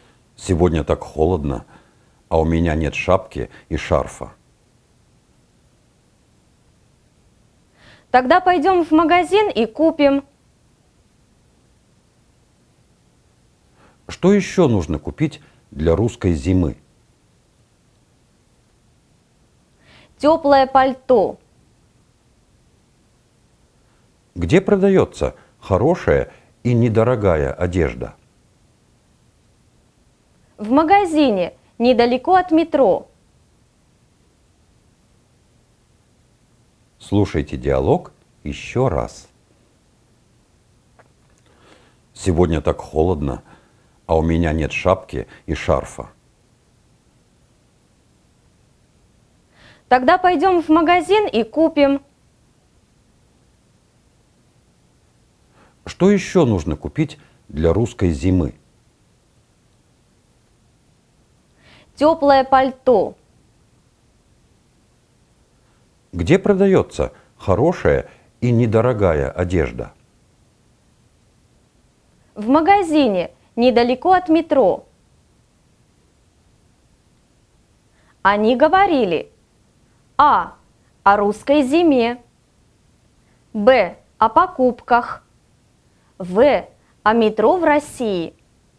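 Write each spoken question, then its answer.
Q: Они говорили: А. О русской зиме. Б. О покупках. В. О метро в России.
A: Б: О покупках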